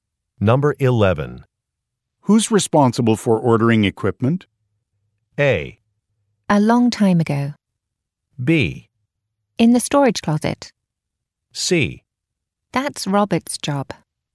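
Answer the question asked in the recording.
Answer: C: That's Robert's job.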